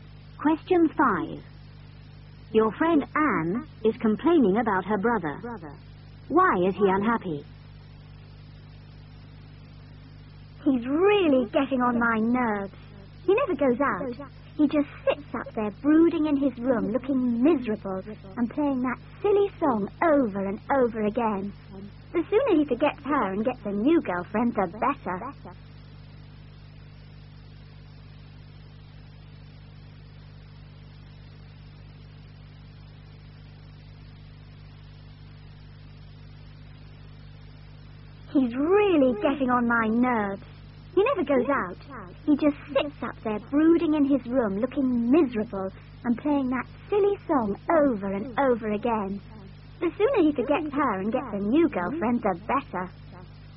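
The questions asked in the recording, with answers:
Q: Why is he unhappy?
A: His girlfriend left him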